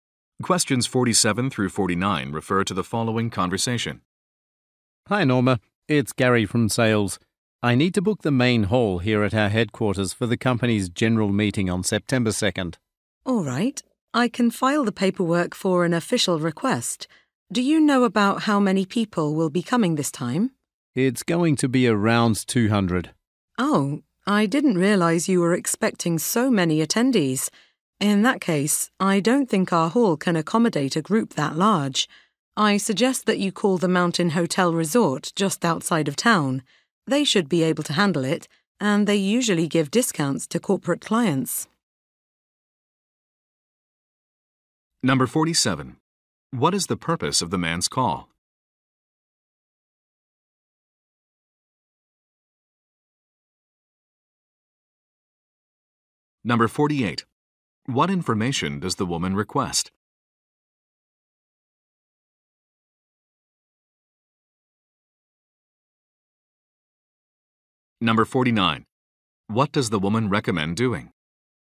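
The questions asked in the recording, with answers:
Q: What is the purpose of the man's call?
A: To book the main hall for the general meeting

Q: What information does the woman request?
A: How many people will attend

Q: What does the woman recommend doing?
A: Calling the Mountain Hotel Resort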